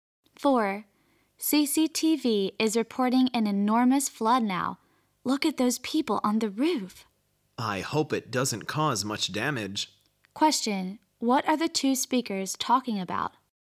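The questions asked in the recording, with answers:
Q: What are the two speakers talking about?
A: A flood reported on TV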